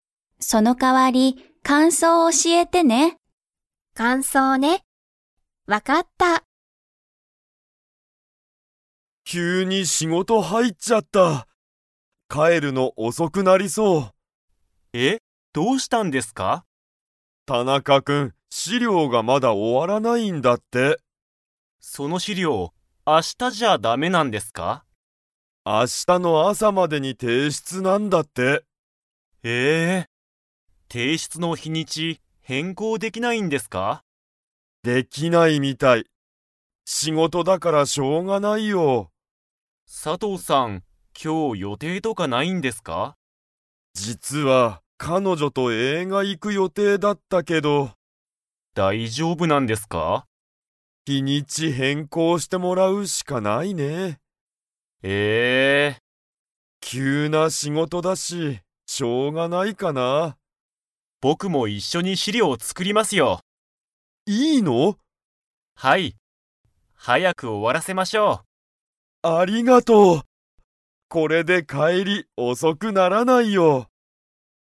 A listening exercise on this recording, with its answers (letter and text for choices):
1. 資料しりょうの提出ていしゅつは、いつまでですか?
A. 今日きょうの夜よる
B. 明日あしたの朝あさ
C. 明日あしたの昼ひる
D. 明日あしたの夜よる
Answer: B. 明日あしたの朝あさ

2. 木村きむらさんは、一緒いっしょに資料しりょうを 。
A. 作つくる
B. 作つくらない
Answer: A. 作つくる

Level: Level 4